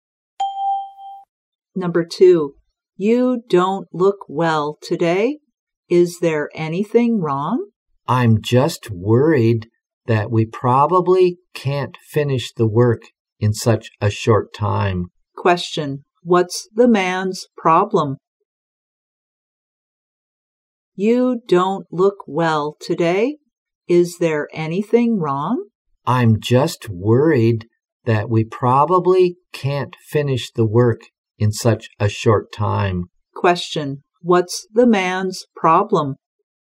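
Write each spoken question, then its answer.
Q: What's the man's problem?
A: He's worried they can't finish the work in such a short time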